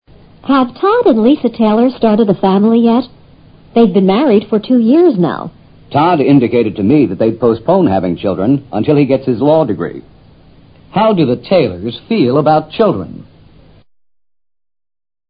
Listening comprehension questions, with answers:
How do the Taylors feel about children?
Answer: They don't want children for the time being.